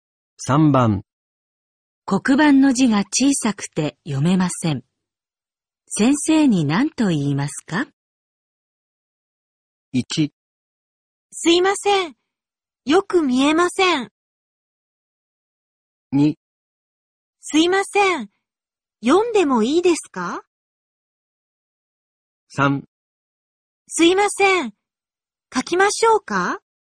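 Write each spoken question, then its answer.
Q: 黒板の字が小さくて読めません。先生に何と言いますか?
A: 1: すいません。よく見えません。

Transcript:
1
すいません、よく見えません。
2
すいません、読んでもいいですか。
3
すいません、書きましょうか。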